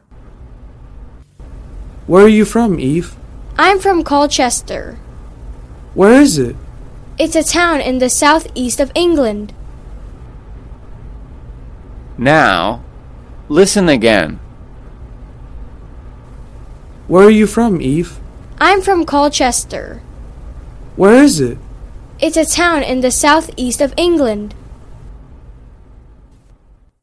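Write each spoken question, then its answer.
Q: Where is Colchester?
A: in the southeast of England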